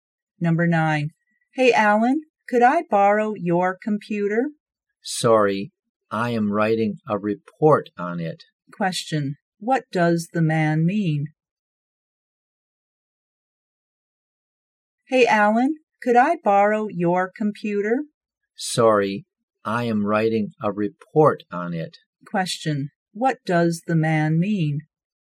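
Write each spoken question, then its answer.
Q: What does the man mean?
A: He can't lend his computer because he is using it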